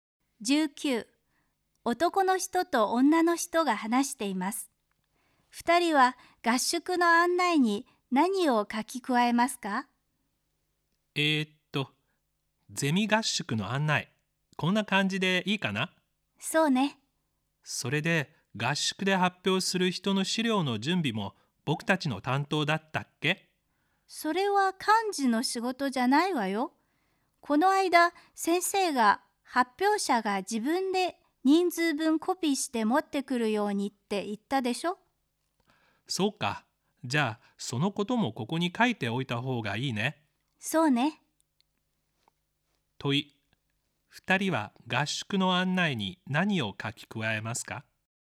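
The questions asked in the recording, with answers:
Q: 問い、2人は合宿の案内に何を書き加えますか。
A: 発表者は自分で資料を人数分コピーして持ってくること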